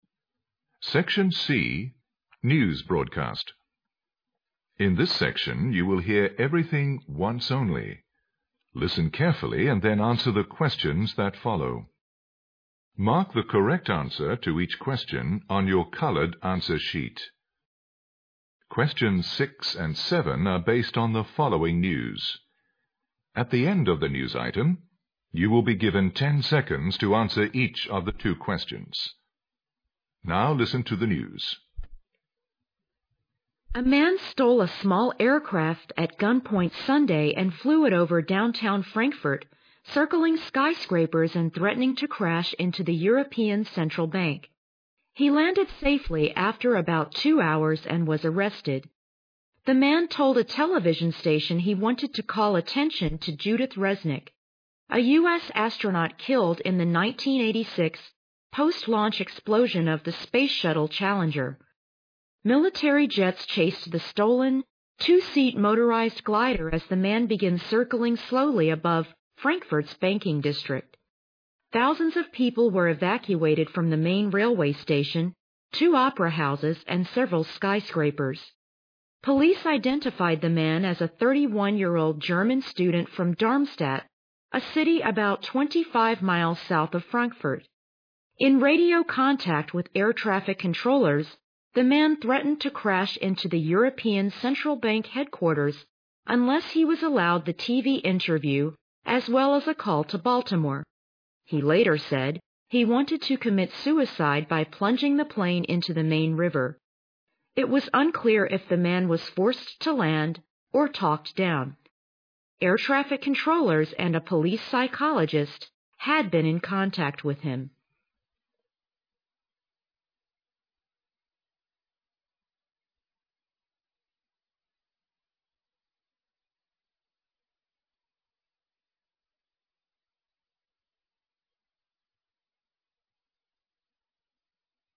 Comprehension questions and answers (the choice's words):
Questions 6 and 7 based on thefollowing news. At the end of the news item, you will be given 10 seconds toanswer each of the two questions.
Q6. The man stole the aircraft mainly because he wanted to _____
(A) destroy the European CentralBank.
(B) have an interview with a TVstation.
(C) circle skyscrapers in downtownFrankfurt.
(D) remember the death of a USastronaut.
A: remember the death of a USastronaut.

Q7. Which of the following statements about the man is TRUE?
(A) He was a 31-year-old studentfrom Frankfurt.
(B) He was piloting a two-seathelicopter he had stolen.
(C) He had talked to air trafficcontrollers by radio.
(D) He threatened to land on theEuropean Central Bank.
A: He had talked to air trafficcontrollers by radio.

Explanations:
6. 细节题。材料介绍说"The man told the television station he wanted tocall attention to Judith Resnick, a US astronaut...",由此可见他这样做的目的是为了纪念一位死去的美国航天员。
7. 细节题。据介绍,盗机者来自Dormstadt,当时正"began circling slowly",威胁说要撞击欧洲中央银行而非在欧洲中央银行着陆(land on the European Central Bank),故A、B、D项都可排除。材料提到小偷和交警通过无线电联系(in radio contact with air trafficcontrollers),故选C项。

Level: GRADE EIGHT